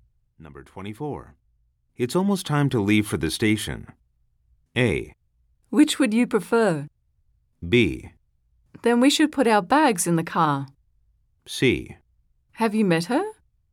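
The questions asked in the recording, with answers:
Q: It's almost time to leave for the station.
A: B: Then we should put our bags in the car.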